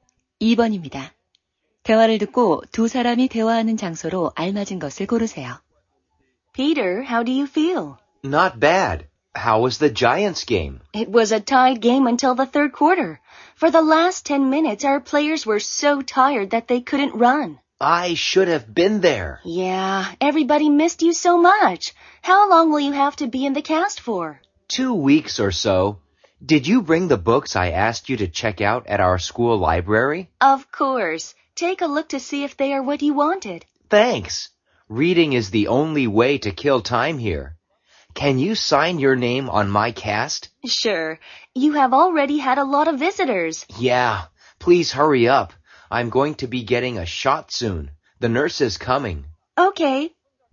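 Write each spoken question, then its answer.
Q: 대화를 듣고 두 사람이 대화하는 장소로 알맞은 것을 고르세요.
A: 병원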